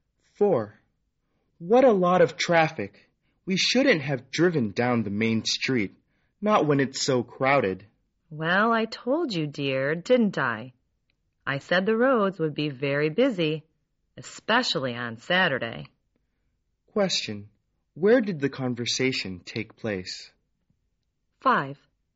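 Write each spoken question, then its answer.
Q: Where did the conversation take place?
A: In a car on the main street.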